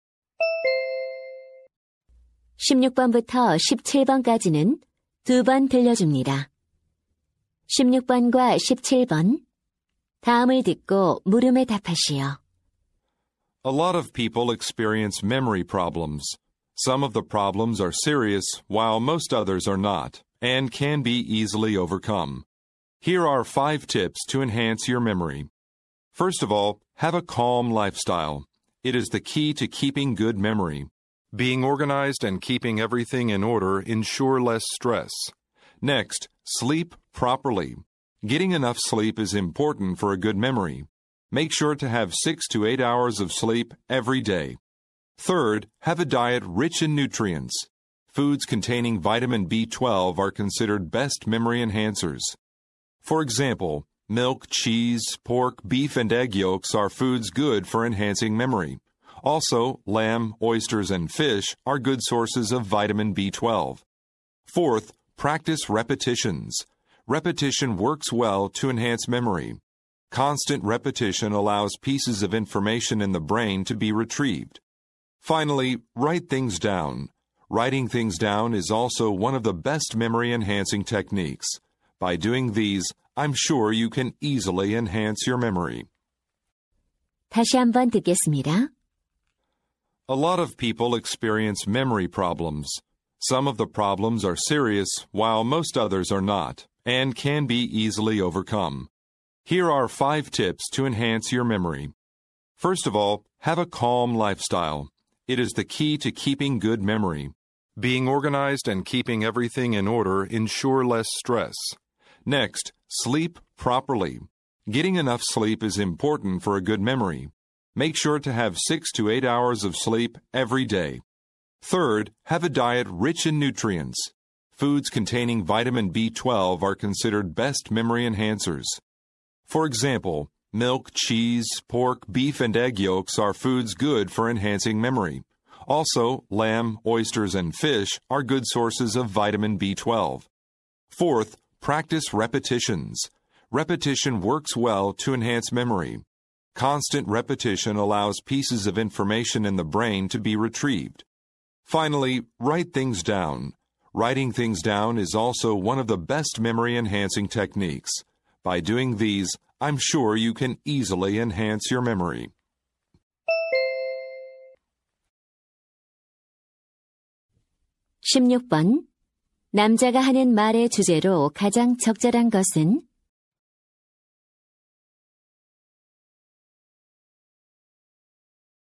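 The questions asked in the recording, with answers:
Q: 남자가 하는 말의 주제로 가장 적절한 것은?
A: 기억력을 향상시키는 방법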